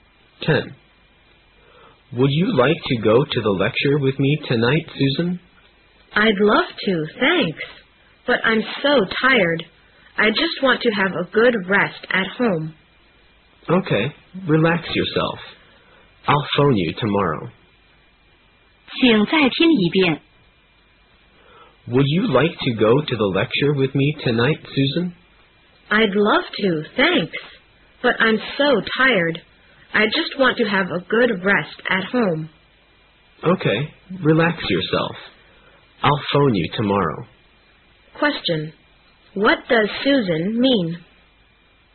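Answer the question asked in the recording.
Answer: She won't go to the lecture; she wants to rest at home.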